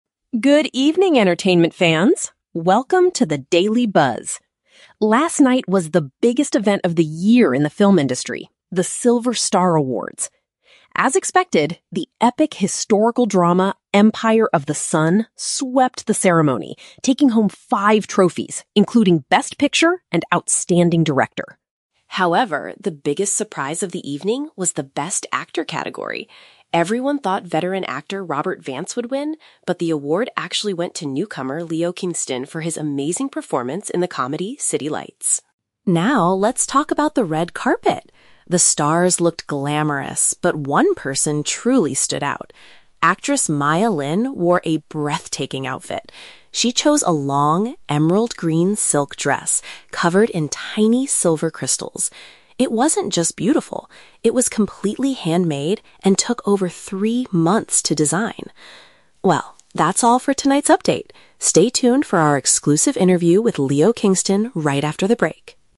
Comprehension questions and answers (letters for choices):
Listen to an entertainment news report. Choose the correct answer (A, B, or C) for each question.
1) Which movie won the award for Best Picture?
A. City Lights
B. The Silver Star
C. Empire of the Sun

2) Why was the Best Actor result considered a surprise?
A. Because an inexperienced actor defeated a highly experienced movie star.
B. Because Robert Vance refused to accept his trophy on the main stage.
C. Because a comedian won the highest award for the very first time.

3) What is mentioned as a special detail about Maya Lin's dress?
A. It was the most expensive green silk gown at the entire event.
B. It was crafted entirely by hand over a long period of time.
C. It was carefully designed by the award-winning actor Leo Kingston.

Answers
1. C
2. A
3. B

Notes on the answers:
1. The anchor states that the historical drama Empire of the Sun took home five trophies, "including Best Picture." Why the traps are wrong: (A) is a trap. City Lights is mentioned, but it is the comedy that Leo Kingston won Best Actor for, not Best Picture. (B) is a trap. The Silver Star is the name of the awards ceremony itself, not a movie.
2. The anchor says everyone thought "veteran actor Robert Vance would win, but the award actually went to newcomer Leo Kingston." ("Newcomer" and "veteran" paraphrase to "inexperienced actor" and "highly experienced movie star"). Why the traps are wrong: (B) is a trap. Robert Vance is mentioned, but he simply lost the award; he did not refuse a trophy. (C) is a plausible entertainment news story, but it is not mentioned in the audio.
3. The anchor describes the dress by saying, "it was completely handmade and took over three months to design" (which paraphrases to "crafted entirely by hand over a long period of time"). Why the traps are wrong: (A) is a trap. The dress was "emerald-green silk," but the anchor never claims it was the most expensive one there. (C) is a trap. Leo Kingston is mentioned earlier in the broadcast as the winning actor, not the designer of the dress.

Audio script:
News Anchor: "Good evening, entertainment fans! Welcome to the Daily Buzz. Last night was the biggest event of the year in the film industry: The Silver Star Awards. As expected, the epic historical drama Empire of the Sun swept the ceremony, taking home five trophies, including Best Picture and Outstanding Director.
However, the biggest surprise of the evening was the Best Actor category. Everyone thought veteran actor Robert Vance would win, but the award actually went to newcomer Leo Kingston for his amazing performance in the comedy City Lights.
Now, let's talk about the red carpet! The stars looked glamorous, but one person truly stood out. Actress Maya Lin wore a breathtaking outfit. She chose a long, emerald-green silk dress covered in tiny silver crystals. It wasn't just beautiful; it was completely handmade and took over three months to design! Well, that's all for tonight's update. Stay tuned for our exclusive interview with Leo Kingston right after the break."